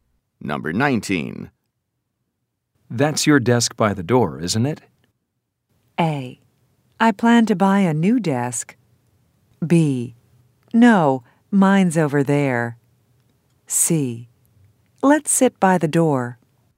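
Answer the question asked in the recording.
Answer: B: No, mine's over there.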